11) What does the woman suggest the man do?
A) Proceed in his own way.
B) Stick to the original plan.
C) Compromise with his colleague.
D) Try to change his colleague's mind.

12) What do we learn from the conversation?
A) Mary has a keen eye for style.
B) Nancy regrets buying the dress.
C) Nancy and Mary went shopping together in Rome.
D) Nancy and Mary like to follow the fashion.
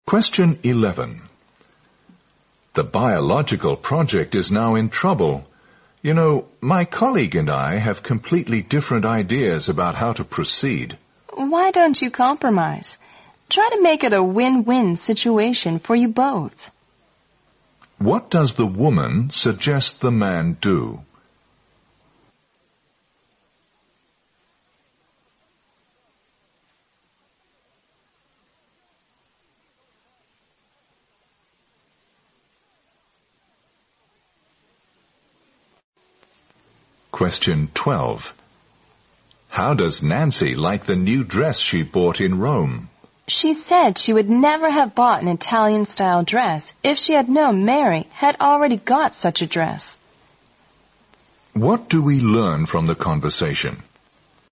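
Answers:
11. Compromise with his colleague.
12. Nancy regrets buying the dress.

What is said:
M: The biological project is now in trouble. You know, my colleague and I have completely different ideas about how to proceed.
W: Why don't you compromise? Try to make it a win-win situation for you both.
Q: What does the woman suggest the man do?
M: How does Nancy like the new dress she bought in Rome?
W: She said she would never have bought an Italian style dress if she had known Mary had already got such a dress.
Q: What do we learn from the conversation?

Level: 六级

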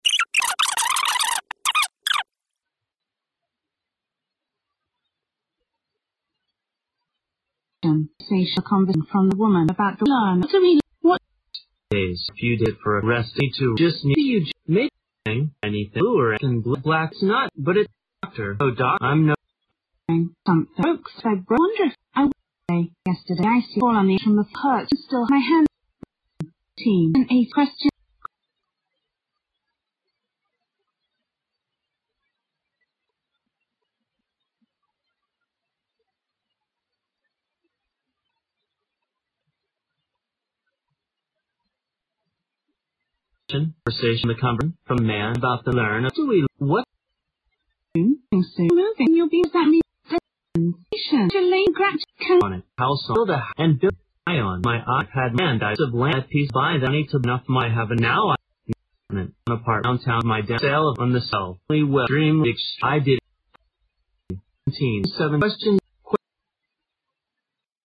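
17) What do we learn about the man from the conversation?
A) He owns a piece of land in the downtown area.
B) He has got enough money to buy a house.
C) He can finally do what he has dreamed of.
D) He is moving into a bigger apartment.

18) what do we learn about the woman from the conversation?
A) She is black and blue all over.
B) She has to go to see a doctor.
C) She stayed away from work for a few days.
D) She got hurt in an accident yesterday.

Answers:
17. He can finally do what he has dreamed of.
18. She got hurt in an accident yesterday.

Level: 大学英语四级

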